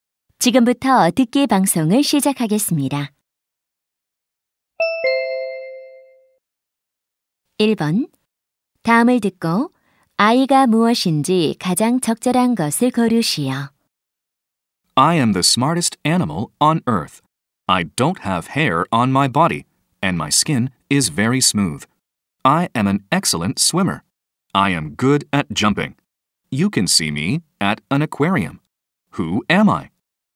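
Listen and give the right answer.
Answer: 돌고래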